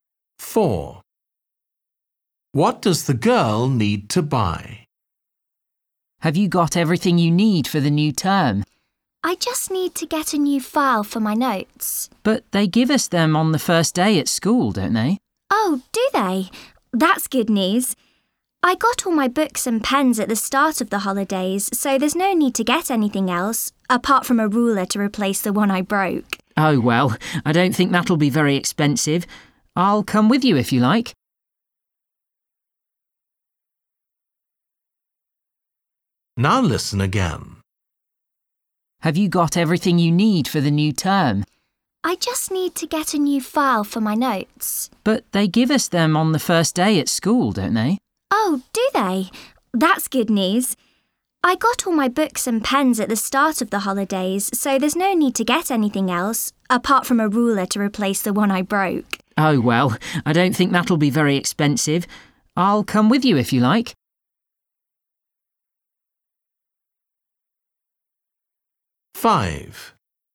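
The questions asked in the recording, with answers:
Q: What does the girl need to buy?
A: a ruler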